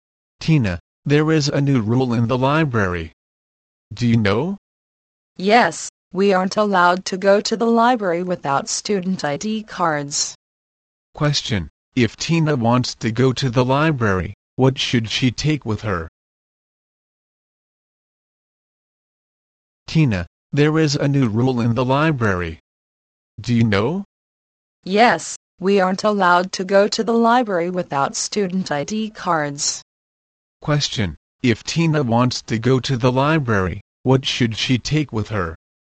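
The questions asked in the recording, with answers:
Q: Question, if Tina wants to go to the library, what should she take with her?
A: Her student ID card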